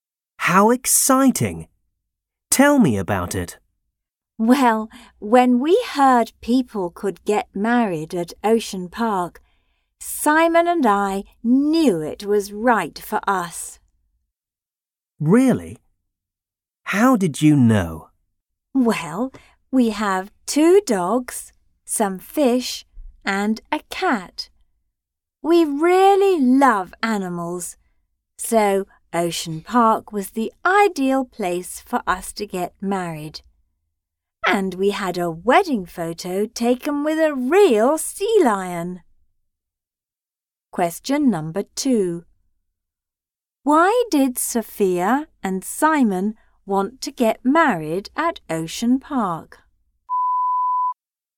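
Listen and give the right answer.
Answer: Because they really love animals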